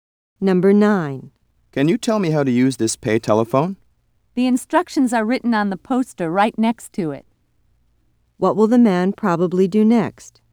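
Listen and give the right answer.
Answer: Read the instructions on the poster next to the phone.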